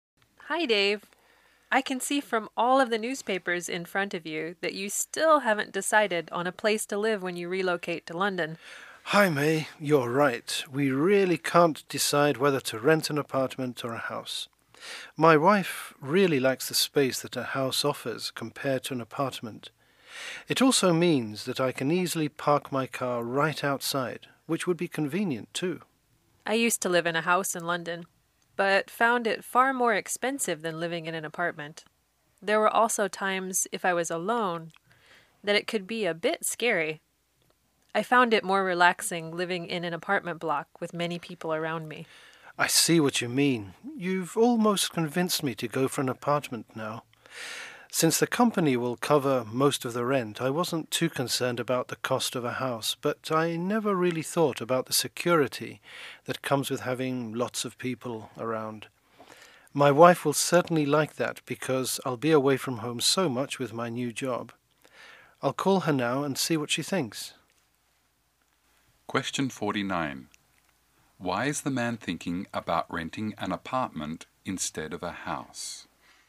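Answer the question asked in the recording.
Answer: Having lots of people around feels more secure, which matters because he'll often be away from home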